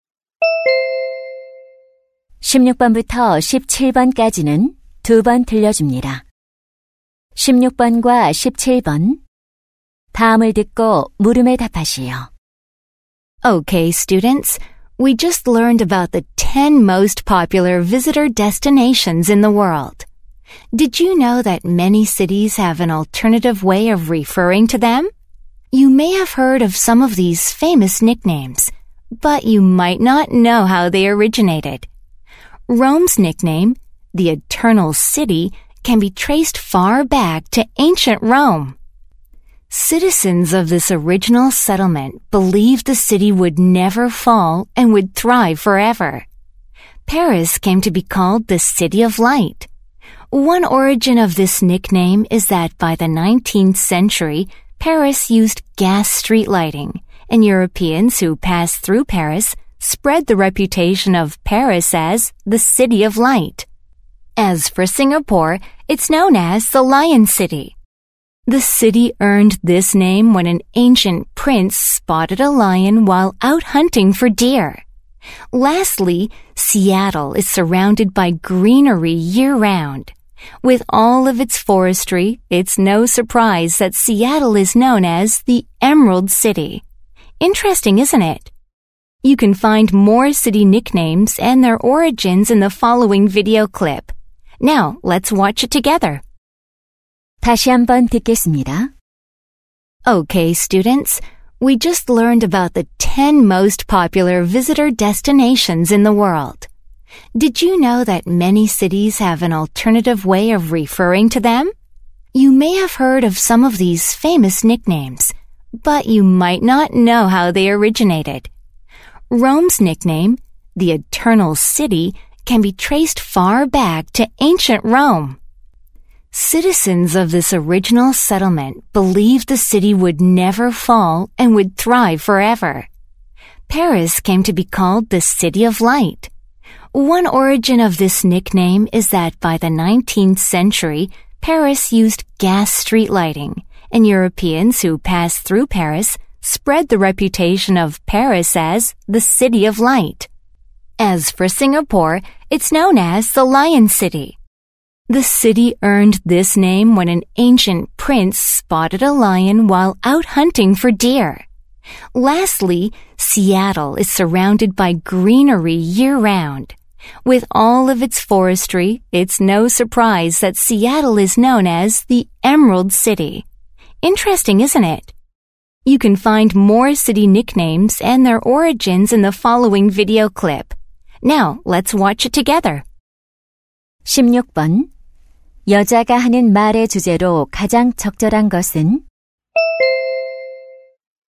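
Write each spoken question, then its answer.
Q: 여자가 하는 말의 주제로 가장 적절한 것은?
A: 도시 별명의 유래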